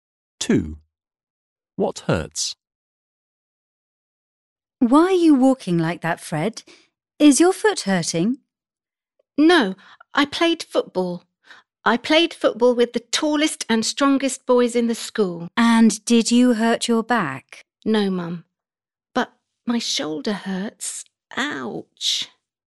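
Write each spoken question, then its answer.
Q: What hurts?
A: His shoulder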